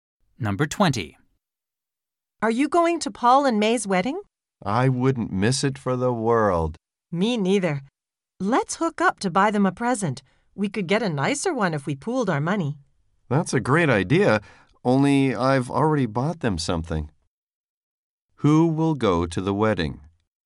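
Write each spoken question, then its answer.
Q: Who will go to the wedding?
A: Both speakers.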